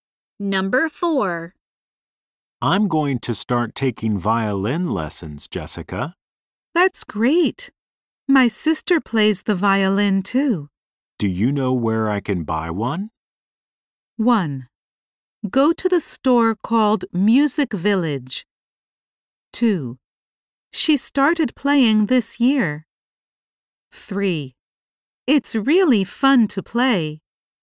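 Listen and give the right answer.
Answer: 1: Go to the store called Music Village.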